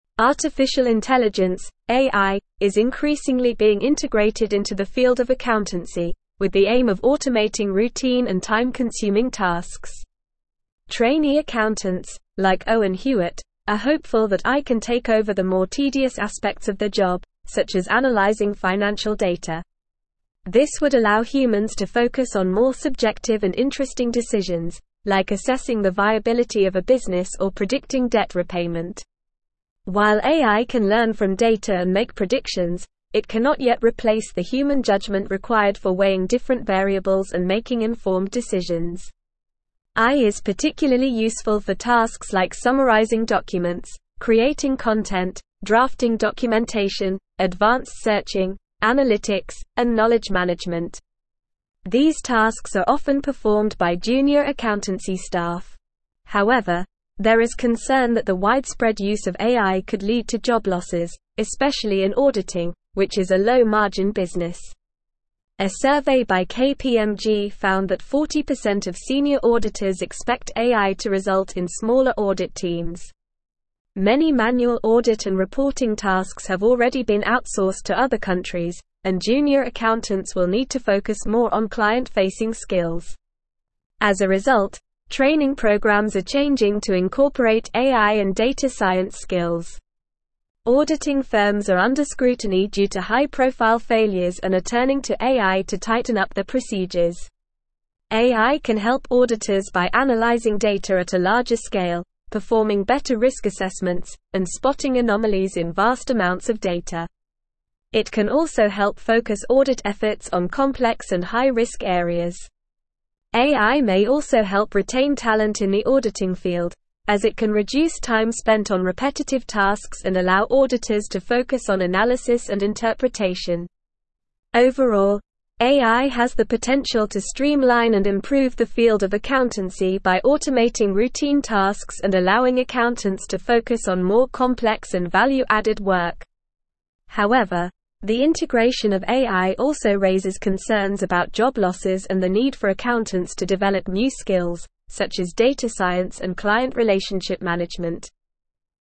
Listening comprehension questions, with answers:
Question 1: Artificial intelligence (AI) is increasingly being (1)______ into the field of accountancy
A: integrated

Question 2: Trainee (2)______, like Owen Hewitt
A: accountants

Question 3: This would allow humans to (3)______ on more subjective and interesting decisions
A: focus

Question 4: like assessing the viability of a business or (4)______ debt repayment.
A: predicting

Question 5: AI is particularly useful for (5)______ like summarizing documents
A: tasks

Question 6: drafting (6)______,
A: documentation

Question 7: (7)______ searching, analytics, and knowledge management.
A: advanced

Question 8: A survey by KPMG found that 40% of senior (8)______ expect AI to result in smaller audit teams.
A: auditors

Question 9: Many manual audit and reporting tasks have already been (9)______ to other countries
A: outsourced

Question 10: As a result, (10)______ programs are changing to incorporate AI and data science skills.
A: training

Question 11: turning to AI to tighten up their (11)______.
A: procedures

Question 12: AI can help auditors by analyzing data at a larger (12)______,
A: scale

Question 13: AI may also help retain (13)______ in the auditing (14)______,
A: talent

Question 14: AI may also help retain (13)______ in the auditing (14)______,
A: field

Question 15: (15)______ auditors to focus on analysis and interpretation.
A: allow

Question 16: such as data science and client (16)______ management.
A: relationship

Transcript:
Artificial intelligence (AI) is increasingly being integrated into the field of accountancy, with the aim of automating routine and time-consuming tasks. Trainee accountants, like Owen Hewitt, are hopeful that AI can take over the more tedious aspects of their job, such as analyzing financial data. This would allow humans to focus on more subjective and interesting decisions, like assessing the viability of a business or predicting debt repayment. While AI can learn from data and make predictions, it cannot yet replace the human judgment required for weighing different variables and making informed decisions.
AI is particularly useful for tasks like summarizing documents, creating content, drafting documentation, advanced searching, analytics, and knowledge management. These tasks are often performed by junior accountancy staff. However, there is concern that the widespread use of AI could lead to job losses, especially in auditing, which is a low-margin business. A survey by KPMG found that 40% of senior auditors expect AI to result in smaller audit teams. Many manual audit and reporting tasks have already been outsourced to other countries, and junior accountants will need to focus more on client-facing skills.
As a result, training programs are changing to incorporate AI and data science skills. Auditing firms are under scrutiny due to high-profile failures and are turning to AI to tighten up their procedures. AI can help auditors by analyzing data at a larger scale, performing better risk assessments, and spotting anomalies in vast amounts of data. It can also help focus audit efforts on complex and high-risk areas. AI may also help retain talent in the auditing field, as it can reduce time spent on repetitive tasks and allow auditors to focus on analysis and interpretation.
Overall, AI has the potential to streamline and improve the field of accountancy by automating routine tasks and allowing accountants to focus on more complex and value-added work. However, the integration of AI also raises concerns about job losses and the need for accountants to develop new skills, such as data science and client relationship management.

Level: Level 4